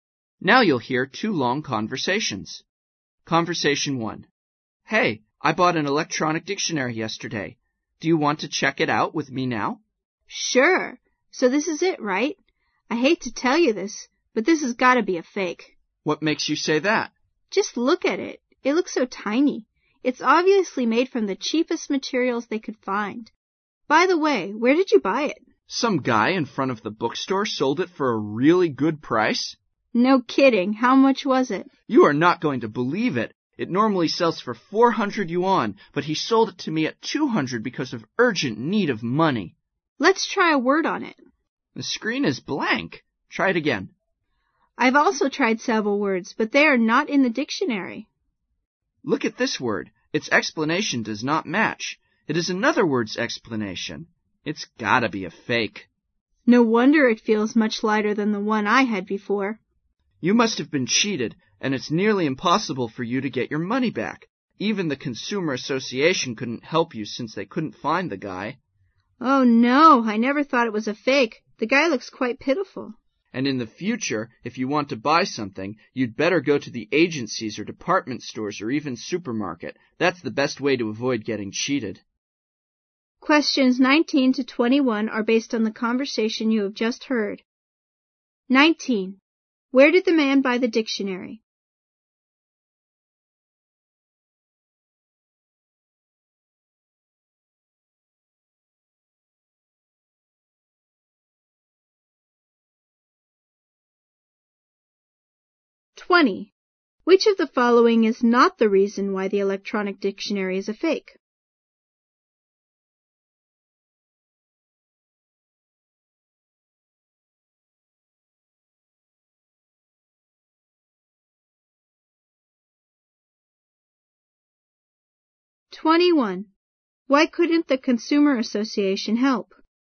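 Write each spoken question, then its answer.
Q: Where did the man buy the dictionary?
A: From a man in front of the bookstore.

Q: Why couldn't the Consumer Association help?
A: Because they couldn't find the seller.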